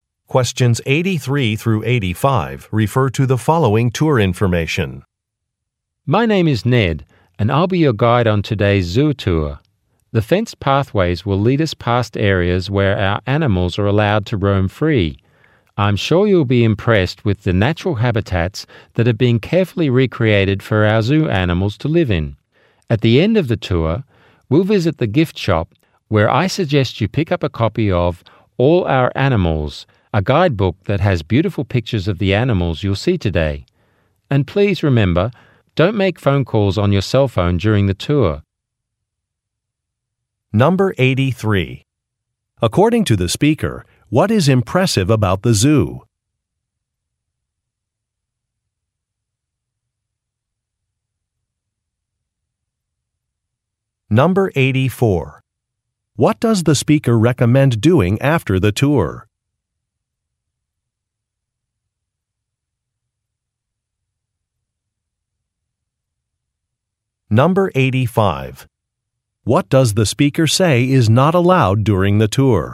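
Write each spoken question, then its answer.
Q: According to the speaker, what is impressive about the zoo?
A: The carefully recreated natural habitats for the animals

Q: What does the speaker recommend doing after the tour?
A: Buying a copy of the guidebook All Our Animals at the gift shop

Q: What does the speaker say is not allowed during the tour?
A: Making phone calls on a cell phone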